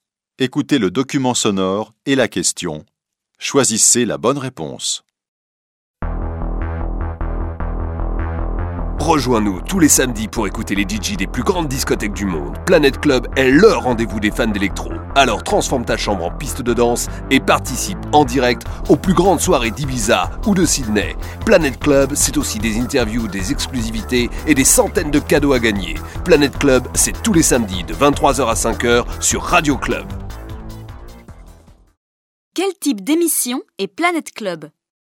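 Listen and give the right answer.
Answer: Une émission de radio de musique électro (DJ)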